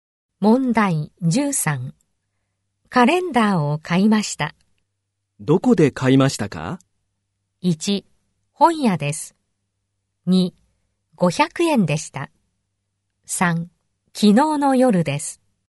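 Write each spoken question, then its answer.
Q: どこで買いましたか?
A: 1: 本屋です。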